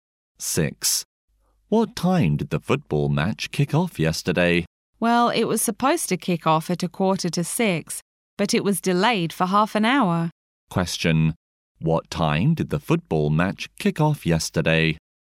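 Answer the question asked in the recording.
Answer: At 6:15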